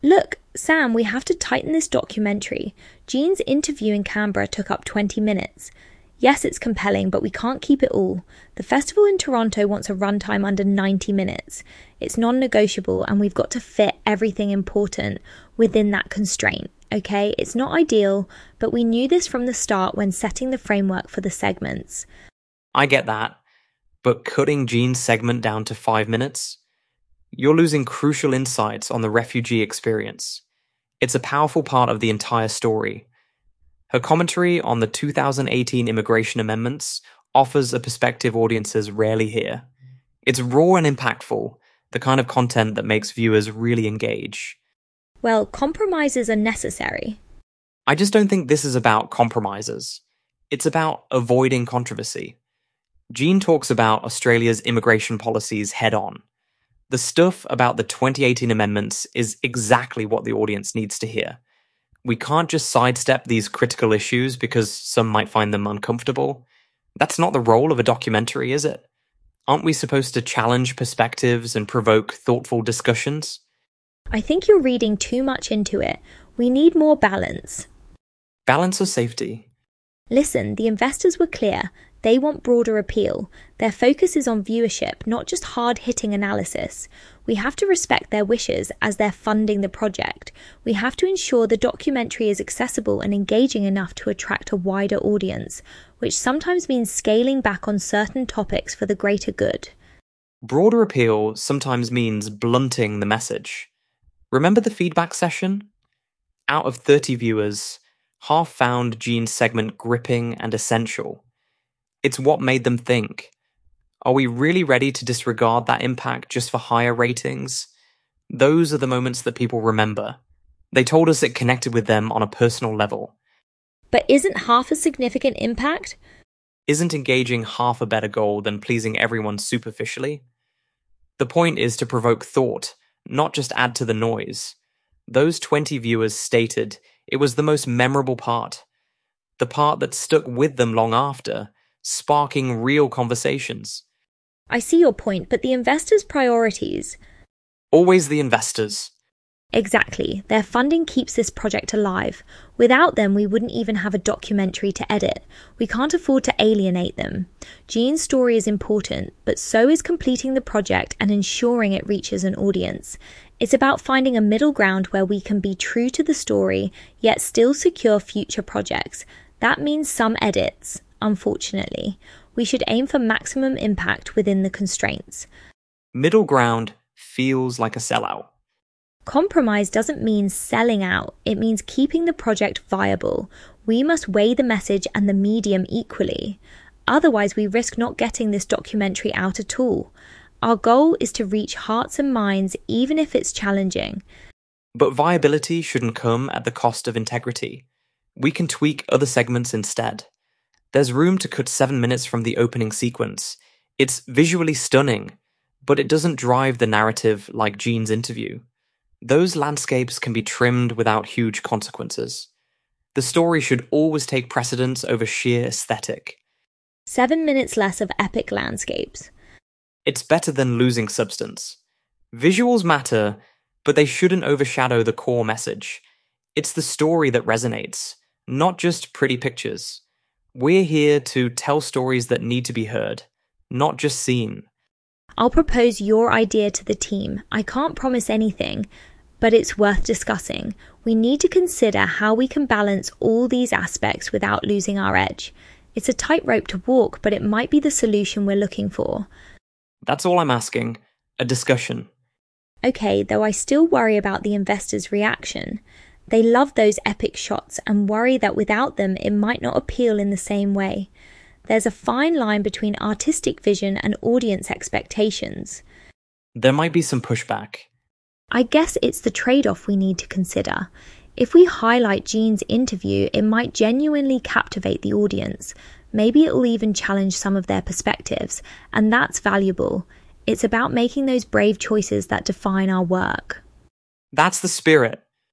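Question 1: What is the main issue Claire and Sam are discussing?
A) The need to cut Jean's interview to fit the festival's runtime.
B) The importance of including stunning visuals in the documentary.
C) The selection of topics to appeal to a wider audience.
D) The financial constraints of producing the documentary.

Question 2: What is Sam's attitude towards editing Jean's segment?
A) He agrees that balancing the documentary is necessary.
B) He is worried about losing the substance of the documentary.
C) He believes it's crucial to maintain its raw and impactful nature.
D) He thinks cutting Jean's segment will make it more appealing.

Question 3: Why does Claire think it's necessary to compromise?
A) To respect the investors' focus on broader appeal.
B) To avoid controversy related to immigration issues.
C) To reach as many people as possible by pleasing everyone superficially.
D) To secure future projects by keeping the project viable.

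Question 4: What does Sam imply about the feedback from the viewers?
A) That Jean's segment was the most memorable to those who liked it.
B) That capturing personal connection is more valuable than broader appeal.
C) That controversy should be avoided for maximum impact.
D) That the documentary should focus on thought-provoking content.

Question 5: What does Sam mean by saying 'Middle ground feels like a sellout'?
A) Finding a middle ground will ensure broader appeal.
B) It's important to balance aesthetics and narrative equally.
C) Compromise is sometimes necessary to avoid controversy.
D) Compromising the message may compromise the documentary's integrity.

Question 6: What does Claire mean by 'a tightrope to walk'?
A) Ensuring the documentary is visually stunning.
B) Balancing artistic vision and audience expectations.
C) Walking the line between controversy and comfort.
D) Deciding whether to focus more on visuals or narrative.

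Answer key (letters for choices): 1A, 2C, 3D, 4B, 5D, 6B

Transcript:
Claire: Look, Sam, we have to tighten this documentary. Jean's interview in Canberra took up twenty minutes. Yes, it's compelling, but we can't keep it all. The festival in Toronto wants a runtime under ninety minutes. It's non-negotiable, and we've got to fit everything important within that constraint, okay? It's not ideal, but we knew this from the start when setting the framework for the segments.
Sam: I get that, but cutting Jean's segment down to five minutes? You're losing crucial insights on the refugee experience. It's a powerful part of the entire story. Her commentary on the 2018 immigration amendments offers a perspective audiences rarely hear. It's raw and impactful, the kind of content that makes viewers really engage.
Claire: Well, compromises are necessary.
Sam: I just don't think this is about compromises. 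It's about avoiding controversy. Jean talks about Australia's immigration policies head-on. The stuff about the 2018 amendments is exactly what the audience needs to hear. We can't just sidestep these critical issues because some might find them uncomfortable. That's not the role of a documentary, is it? Aren't we supposed to challenge perspectives and provoke thoughtful discussions?
Claire: I think you're reading too much into it. We need more balance—
Sam: Balance or safety?
Claire: Listen, the investors were clear. They want broader appeal. Their focus is on viewership, not just hard-hitting analysis. We have to respect their wishes as they're funding the project. We have to ensure the documentary is accessible and engaging enough to attract a wider audience, which sometimes means scaling back on certain topics for the greater good.
Sam: Broader appeal sometimes means blunting the message. 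Remember the feedback session? Out of thirty viewers, half found Jean's segment gripping and essential. It's what made them think. Are we really ready to disregard that impact just for higher ratings? Those are the moments that people remember. They told us it connected with them on a personal level.
Claire: But isn't half a significant impact?
Sam: Isn't engaging half a better goal than pleasing everyone superficially? The point is to provoke thought, not just add to the noise. Those twenty viewers stated it was the most memorable part, the part that stuck with them long after, sparking real conversations.
Claire: I see your point, but the investors' priorities—
Sam: Always the investors...
Claire: Exactly. Their funding keeps this project alive. Without them, we wouldn't even have a documentary to edit. We can't afford to alienate them. Jean's story is important, but so is completing the project and ensuring it reaches an audience. 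It's about finding a middle ground where we can be true to the story yet still secure future projects. That means some edits, unfortunately. We should aim for maximum impact within the constraints.
Sam: Middle ground feels like a sellout.
Claire: Compromise doesn't mean selling out. It means keeping the project viable. We must weigh the message and the medium equally. Otherwise, we risk not getting this documentary out at all. Our goal is to reach hearts and minds, even if it's challenging.
Sam: But viability shouldn't come at the cost of integrity. We can tweak other segments instead. There's room to cut seven minutes from the opening sequence. It's visually stunning, but it doesn't drive the narrative like Jean's interview. Those landscapes can be trimmed without huge consequences. The story should always take precedence over sheer aesthetic.
Claire: Seven minutes less of epic landscapes...
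Sam: It's better than losing substance. Visuals matter, but they shouldn't overshadow the core message. It's the story that resonates, not just pretty pictures. We're here to tell stories that need to be heard, not just seen.
Claire: I'll propose your idea to the team. I can't promise anything, but it's worth discussing. We need to consider how we can balance all these aspects without losing our edge. It's a tightrope to walk, but it might be the solution we're looking for.
Sam: That's all I'm asking, a discussion.
Claire: Okay, though I still worry about the investors' reaction. They love those epic shots and worry that without them, it might not appeal in the same way. There's a fine line between artistic vision and audience expectations.
Sam: There might be some pushback.
Claire: I guess it's the trade-off we need to consider. If we highlight Jean's interview, it might genuinely captivate the audience. 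Maybe it'll even challenge some of their perspectives, and that's valuable. It's about making those brave choices that define our work.
Sam: That's the spirit!

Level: C1 Advanced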